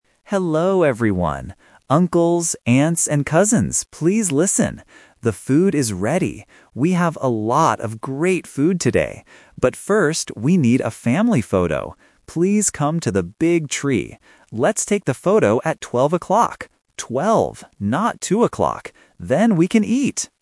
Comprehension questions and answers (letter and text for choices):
Listen to the announcement at a family gathering. Choose the correct answer (A, B, or C) for each question.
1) What is ready?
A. The games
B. The food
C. The music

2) What does the family need to do first?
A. Eat the food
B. Go home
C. Take a photo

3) What time is the family photo?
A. 2 o'clock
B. 10 o'clock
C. 12 o'clock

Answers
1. B. The food
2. C. Take a photo
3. C. 12 o'clock

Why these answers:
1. The uncle clearly says, "The food is ready." Option A (games) and Option C (music) are common things at a party, but they are never mentioned in the audio.
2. The uncle says the food is ready, but then he adds, "But first, we need a family photo" and spells P-H-O-T-O. Option A (Eat the food) is a trap because eating happens after the photo ("Then, we can eat!").
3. The uncle says, "Let's take the photo at 12 o'clock" and repeats the word "Twelve." Option A (2 o'clock) is the main trap because the uncle explicitly says, "Not two o'clock." Option B (10 o'clock) is just a plausible number.